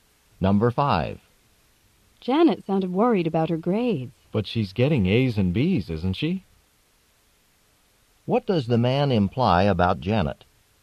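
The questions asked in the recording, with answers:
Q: What does the man imply about Janet?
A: She has no reason to worry; her grades are good.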